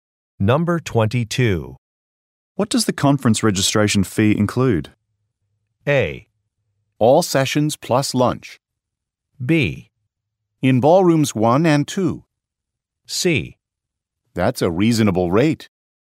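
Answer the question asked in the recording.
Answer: A: All sessions plus lunch.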